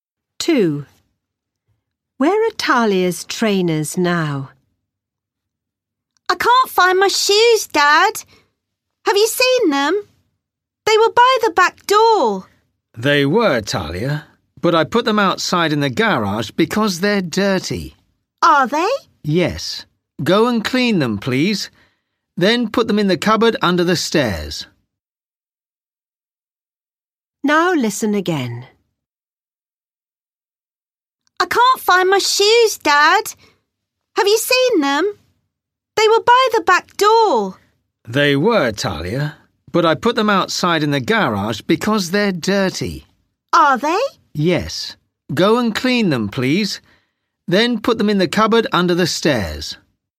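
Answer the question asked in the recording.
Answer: in the garage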